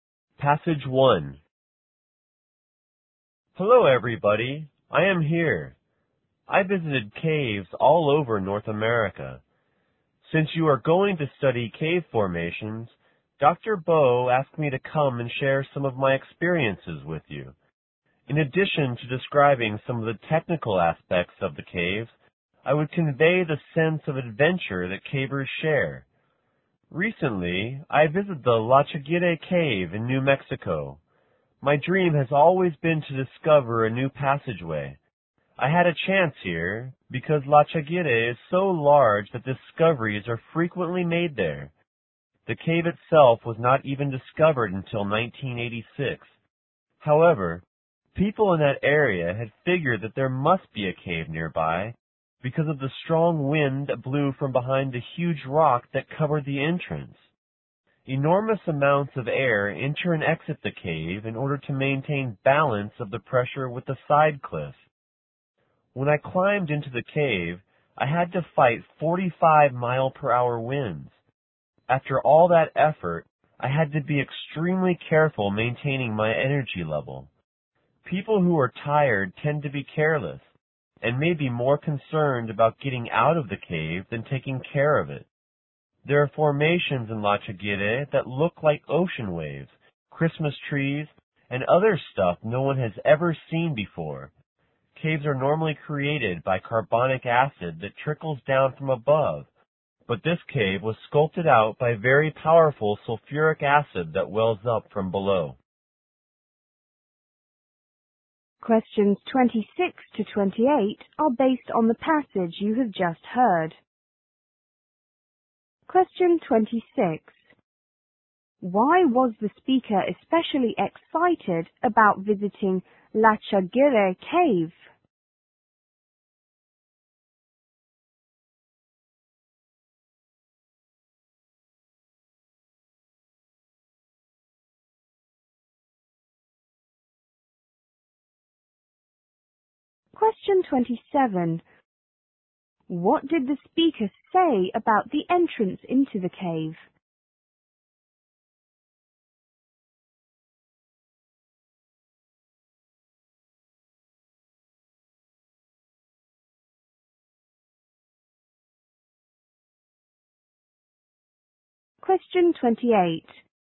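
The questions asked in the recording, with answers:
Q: Why was the speaker especially excited about visiting La Chaguire Cave?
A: He hoped to discover a new passageway

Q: What did the speaker say about the entrance into the cave?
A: Strong winds blow through it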